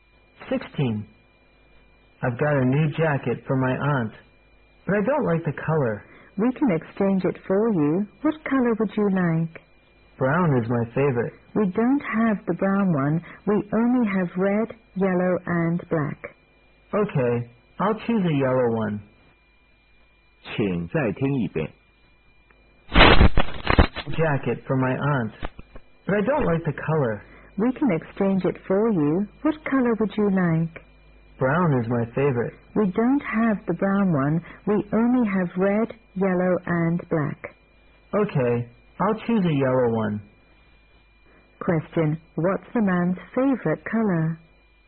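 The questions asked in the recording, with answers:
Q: what's the man's favorite color?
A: Brown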